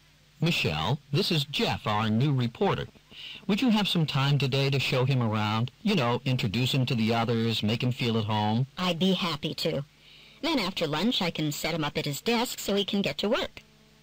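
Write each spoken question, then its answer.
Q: What will Jeff probably do after lunch?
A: Start working at his desk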